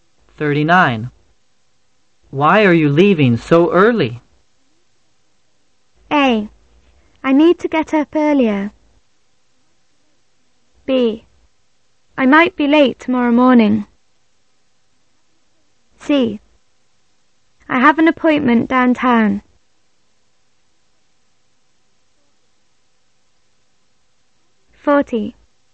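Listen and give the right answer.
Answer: C: I have an appointment downtown.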